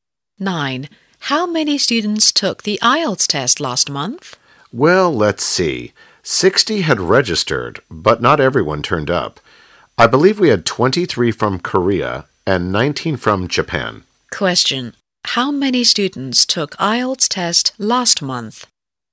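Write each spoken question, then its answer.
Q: How many students took IELTS test last month?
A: 42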